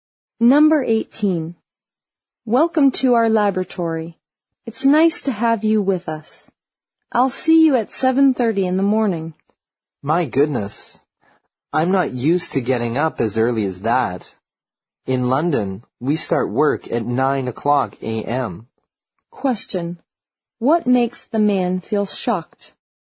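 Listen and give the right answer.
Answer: He has to start work at 7:30 in the morning.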